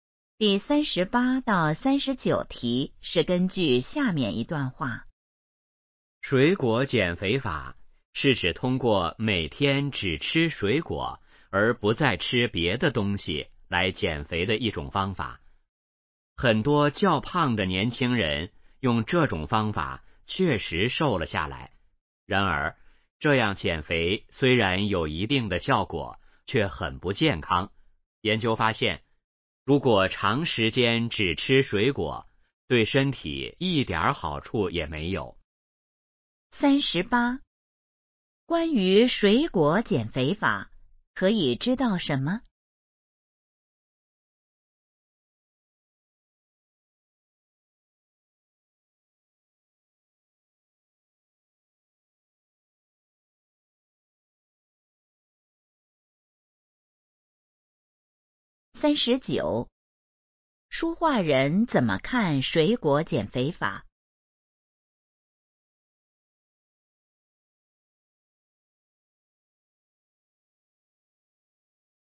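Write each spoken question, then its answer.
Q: 书画人怎么看水果减肥法?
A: 不健康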